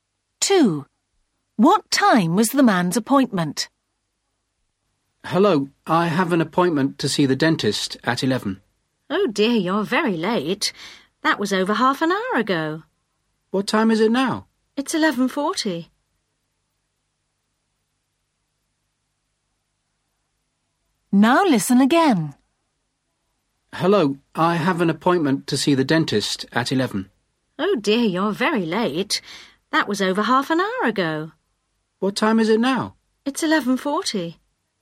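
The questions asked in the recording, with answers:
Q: What time was the man's appointment?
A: 11 o'clock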